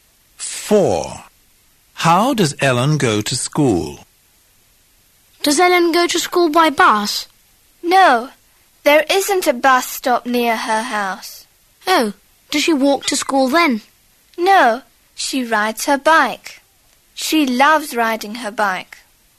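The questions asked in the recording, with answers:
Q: How does Ellen go to school?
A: she rides her bike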